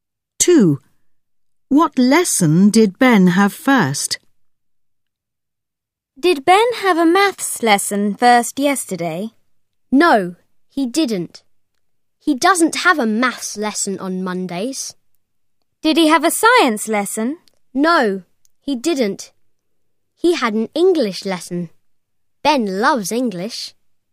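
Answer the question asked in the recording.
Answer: English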